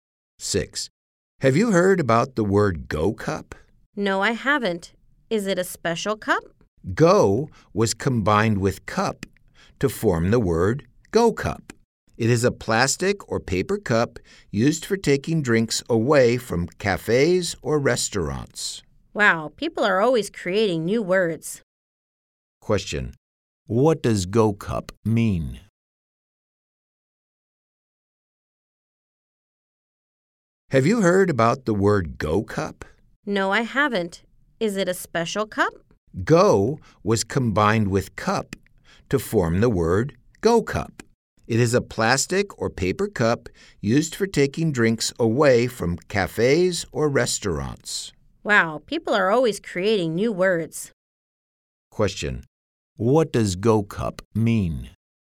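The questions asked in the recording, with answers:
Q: What does Go Cup mean?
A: A plastic or paper cup for takeaway drinks.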